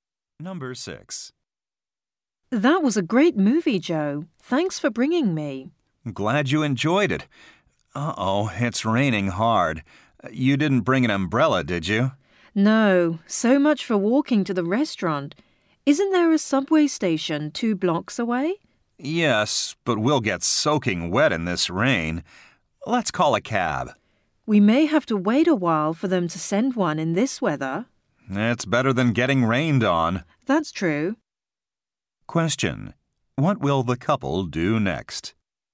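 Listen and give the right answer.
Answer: Call a taxi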